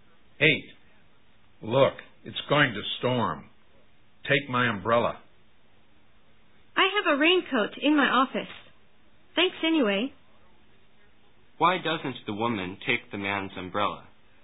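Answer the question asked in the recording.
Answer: She has a raincoat in her office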